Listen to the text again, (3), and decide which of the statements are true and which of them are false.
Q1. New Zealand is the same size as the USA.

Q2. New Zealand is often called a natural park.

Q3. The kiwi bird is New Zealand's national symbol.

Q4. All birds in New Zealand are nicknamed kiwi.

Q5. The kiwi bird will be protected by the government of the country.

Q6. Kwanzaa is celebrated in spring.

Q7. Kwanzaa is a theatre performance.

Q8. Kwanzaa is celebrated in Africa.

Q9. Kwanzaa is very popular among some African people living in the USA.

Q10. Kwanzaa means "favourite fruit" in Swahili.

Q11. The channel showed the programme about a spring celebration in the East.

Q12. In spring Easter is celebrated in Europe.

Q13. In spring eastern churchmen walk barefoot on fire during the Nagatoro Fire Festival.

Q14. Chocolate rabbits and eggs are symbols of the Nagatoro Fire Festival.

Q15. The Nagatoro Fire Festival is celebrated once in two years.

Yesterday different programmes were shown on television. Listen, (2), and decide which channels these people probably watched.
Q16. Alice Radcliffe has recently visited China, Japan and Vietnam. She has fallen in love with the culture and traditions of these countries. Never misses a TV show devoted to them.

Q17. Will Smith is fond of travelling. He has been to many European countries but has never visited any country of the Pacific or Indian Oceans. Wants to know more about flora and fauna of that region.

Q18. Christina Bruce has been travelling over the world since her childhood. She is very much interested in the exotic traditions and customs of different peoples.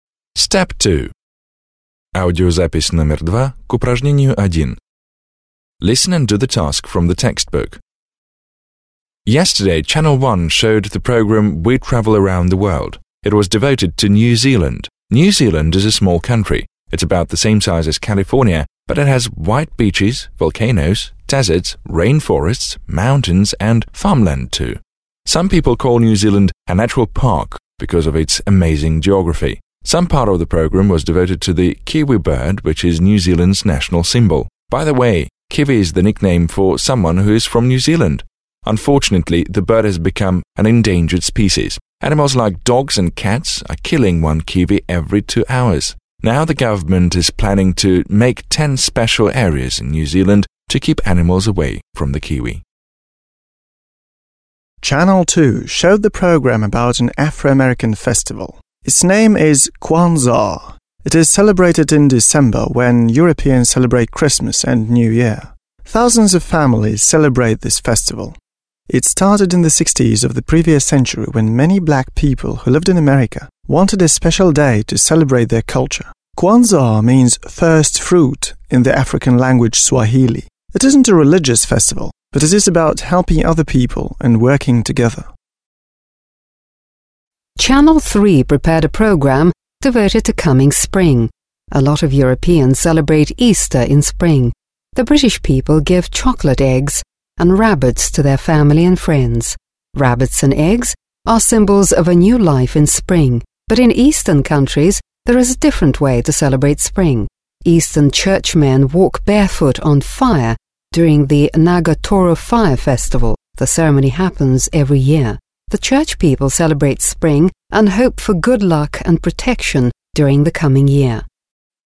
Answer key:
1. False
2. True
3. True
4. False
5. True
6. False
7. False
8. False
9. True
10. False
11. True
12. True
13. True
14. False
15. False
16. Channel 3
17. Channel 1
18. Channel 2

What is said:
Yesterday Channel 1 showed the programme "We Travel around the World". It was devoted to New Zealand. New Zealand is a small country. It's about the same size as California, but it has white beaches, volcanoes, deserts, rainforests, mountains and farmland too. Some people call New Zealand a natural park because of its amazing geography. Part of the programme was devoted to the kiwi bird, which is New Zealand's national symbol. By the way, kiwi is the nickname for someone who is from New Zealand. Unfortunately, the bird has become an endangered species. Animals like dogs and cats are killing one kiwi every two hours. Now the government is planning to make ten special areas in New Zealand to keep animals away from the kiwi.
Channel 2 showed the programme about an Afro−American festival called Kwanzaa. It is celebrated in December when Europeans celebrate Christmas and New Year. Thousands of families celebrate this festival. It started in the 1960s when many black people who lived in America wanted a special way to celebrate their culture. "Kwanzaa" means "first fruit" in the African language Swahili. It isn't a religious festival, but it is about helping other people and working together.
Channel 3 prepared a programme devoted to the coming of spring. A lot of Europeans celebrate Easter in spring. The British people give chocolate eggs and rabbits to their families and friends. Rabbits and eggs are symbols of a new life in spring. But in eastern countries there is a different way of celebrating spring. Eastern churchmen walk barefoot on fire during the Nagatoro Fire Festival. The ceremony happens every year. The church people celebrate spring and hope for good luck and protection during the coming year.

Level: 9 класс